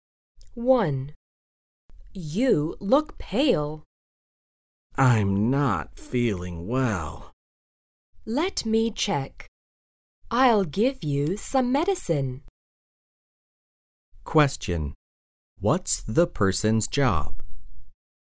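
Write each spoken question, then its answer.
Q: What's the person's job?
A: A doctor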